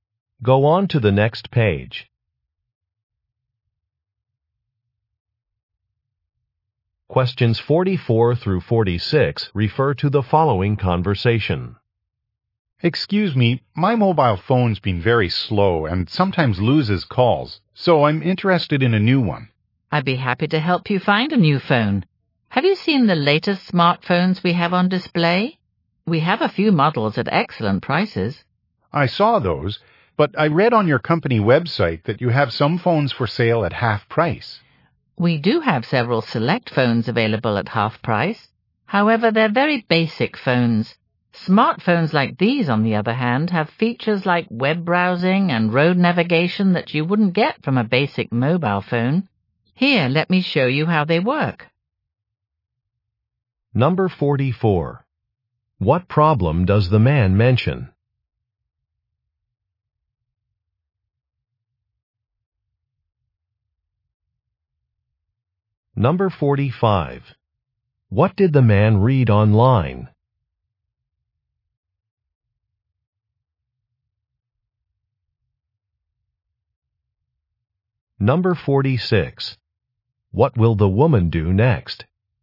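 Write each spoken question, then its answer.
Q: What problem does the man mention?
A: His phone is slow and drops calls

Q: What did the man read online?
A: Some phones are on sale at half price

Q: What will the woman do next?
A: Show him how the smartphones work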